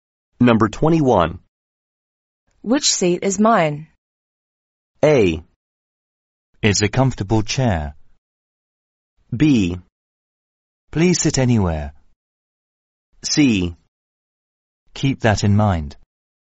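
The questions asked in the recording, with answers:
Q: Which seat is mine?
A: B: Please sit anywhere.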